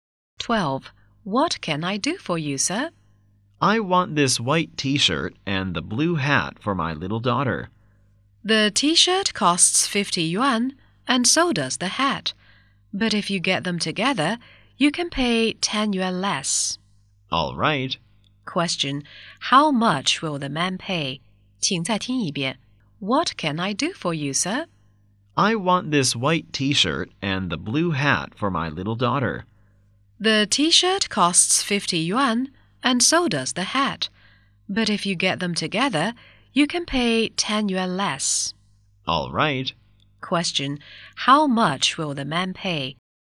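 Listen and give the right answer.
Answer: 90 yuan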